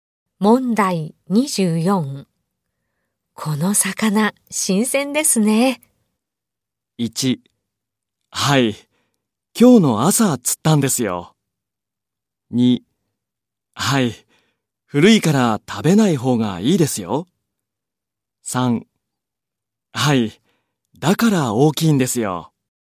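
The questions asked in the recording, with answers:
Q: この魚、新鮮ですね。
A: 1: はい、今日の朝釣ったんですよ。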